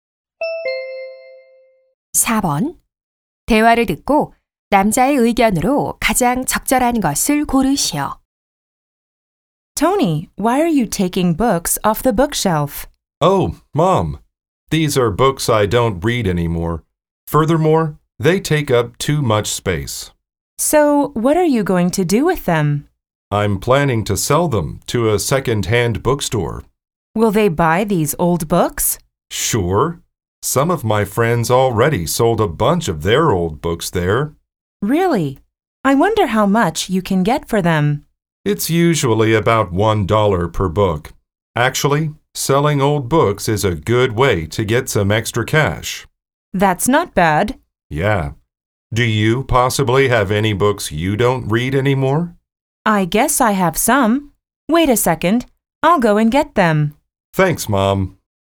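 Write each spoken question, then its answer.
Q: 대화를 듣고 남자의 의견으로 가장 적절한 것을 고르시오.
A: 헌책을 파는 것은 용돈을 버는 좋은 방법이다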